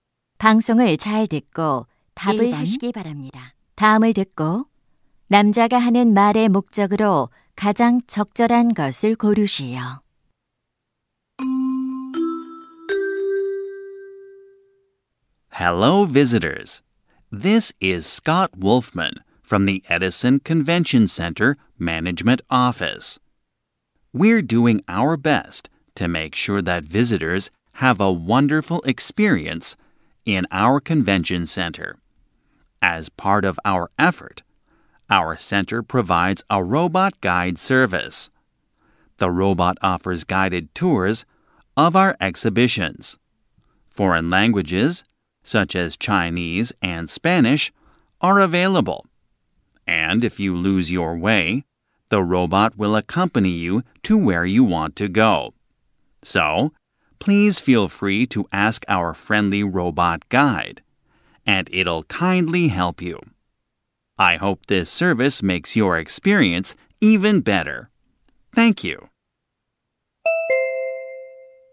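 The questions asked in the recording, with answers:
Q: 다음을 듣고 남자가 하는 말의 목적으로 가장 적절한 것을 고르시오.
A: 컨벤션 센터의 로봇 안내 서비스를 소개하려고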